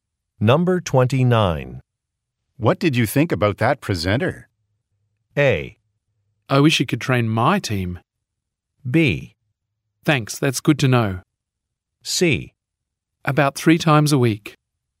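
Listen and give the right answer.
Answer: A: I wish you could train my team.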